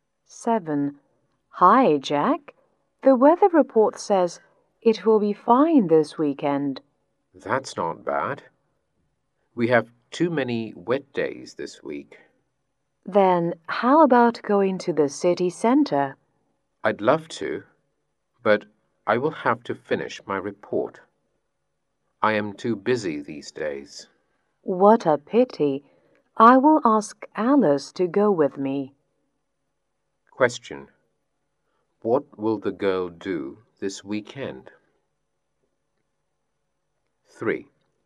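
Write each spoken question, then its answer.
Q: What will the girl do this weekend?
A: Go to the city center with Alice.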